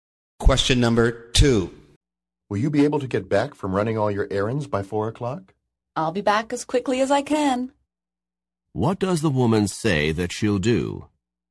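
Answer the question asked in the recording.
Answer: Come back as quickly as she can.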